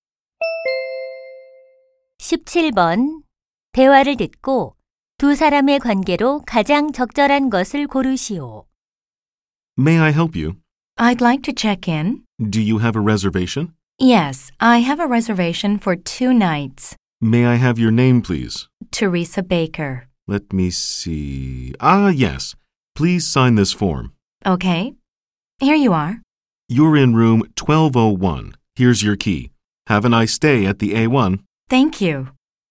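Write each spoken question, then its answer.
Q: 대화를 듣고 두 사람의 관계로 가장 적절한 것을 고르시오.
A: 호텔 직원과 투숙객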